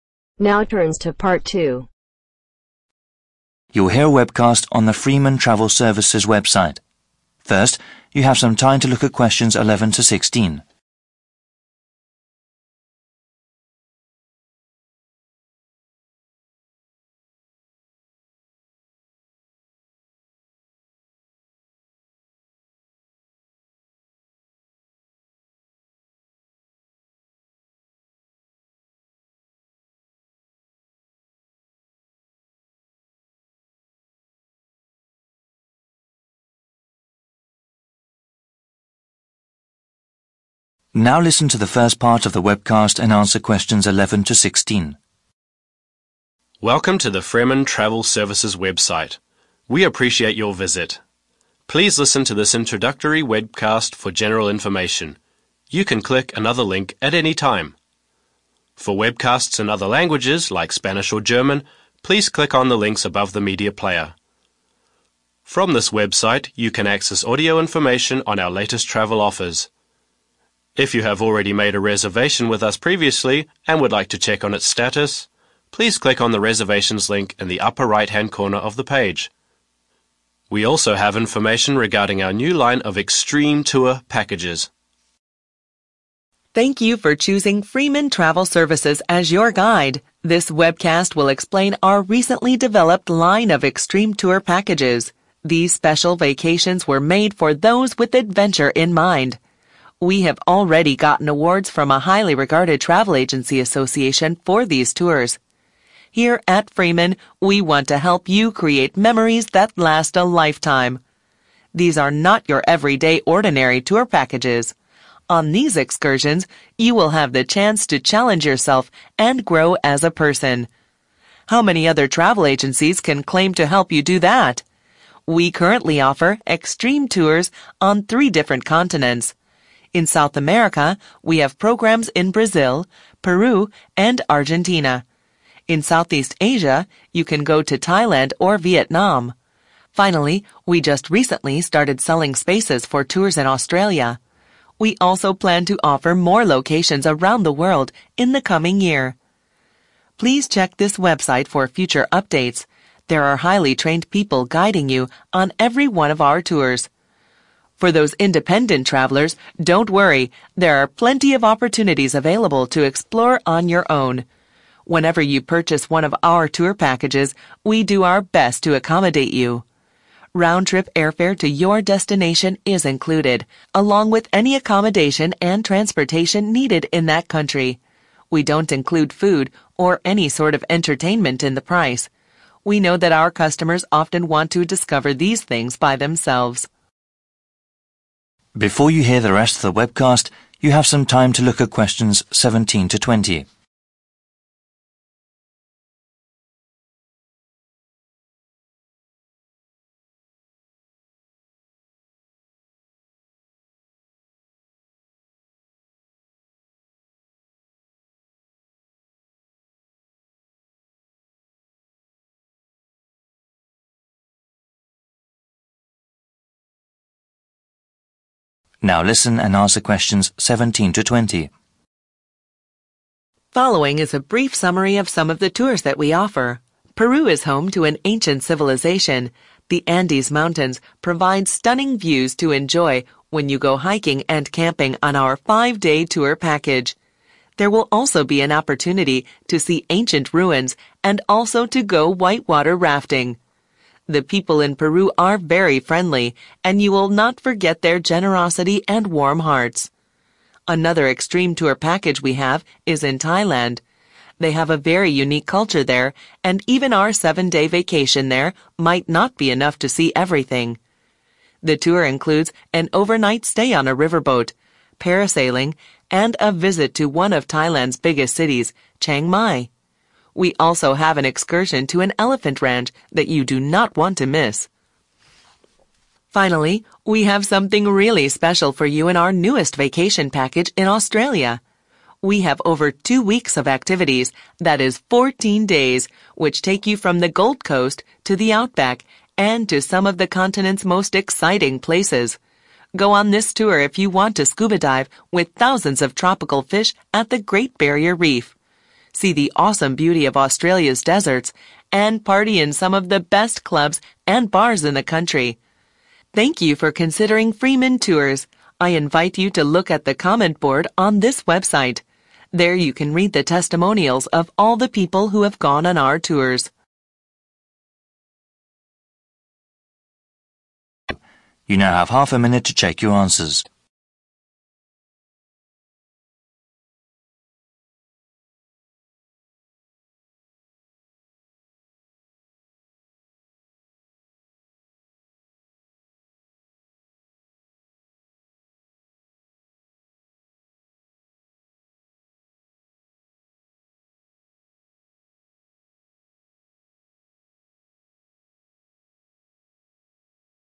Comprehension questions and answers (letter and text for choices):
Choose the correct letter A, B or C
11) To find out more about reservations,one need to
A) click a link in a corner of the page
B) navigate to another page on the website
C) call a number that is at the bottom of the page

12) 'Extreme Tours' are special vacation packages for those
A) who desire to visit safe destinations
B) who need to see familiar places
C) who want to have a really exciting experience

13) The travel agency says these excursions will give people the chance to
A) see famous and well-known tourist sites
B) test themselves and become stronger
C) buy lots of interesting souvenirs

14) The company has offers in south America, Australia and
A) North America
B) Southeast Asia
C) Europe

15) Unlike other companies, Fremen allows you to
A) hire a car for the duration of your vacation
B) travel about independently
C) speak with a travel agent for free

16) Included in all tour packages is the cost of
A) airfare, accommodation and transportation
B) food and entertainment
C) tour guides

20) Continent's most 20........... |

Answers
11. A) click a link in a corner of the page
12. C) who want to have a really exciting experience
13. B) test themselves and become stronger
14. B) Southeast Asia
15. B) travel about independently
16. A) airfare, accommodation and transportation
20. exciting places